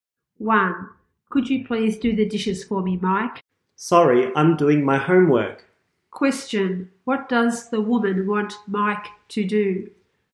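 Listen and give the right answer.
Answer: Do the dishes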